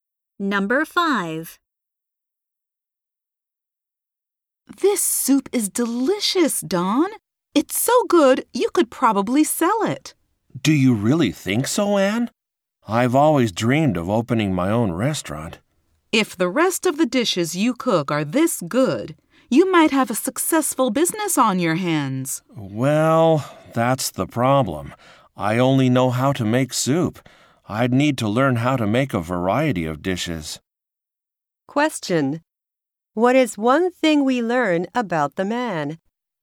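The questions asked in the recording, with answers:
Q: What is one thing we learn about the man?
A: He only knows how to make soup.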